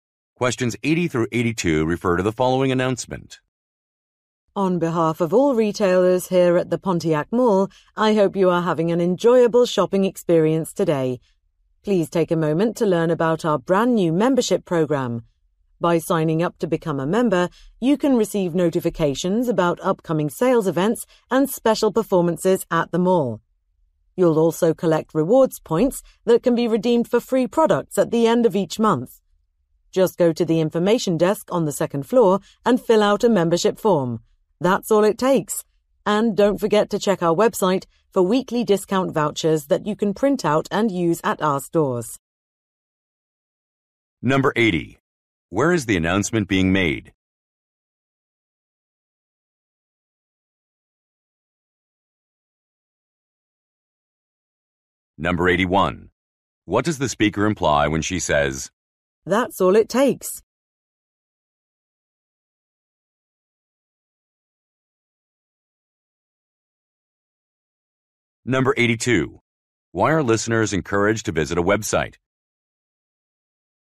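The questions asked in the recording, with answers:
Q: Where is the announcement being made?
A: At a shopping mall

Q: Why are listeners encouraged to visit a website?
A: To get weekly discount vouchers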